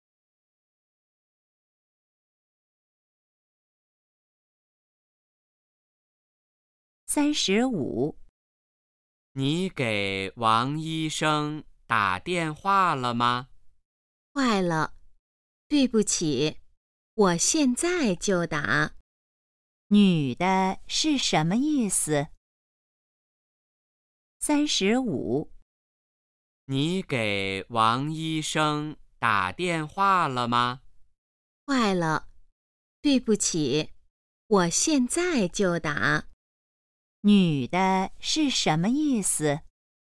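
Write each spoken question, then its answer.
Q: 女的是什么意思?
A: 她忘了给王医生打电话,现在就打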